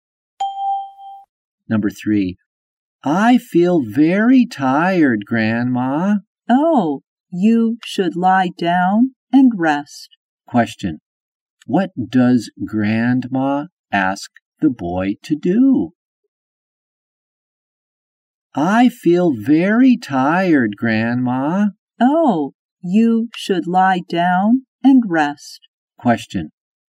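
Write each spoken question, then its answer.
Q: What does Grandma ask the boy to do?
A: Lie down and rest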